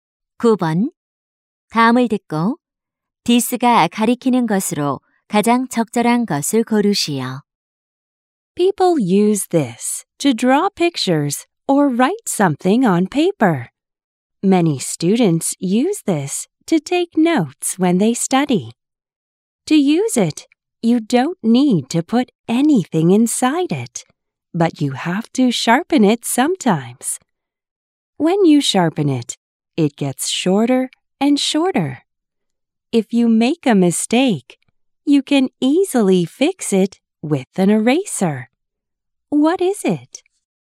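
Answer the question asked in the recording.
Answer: 연필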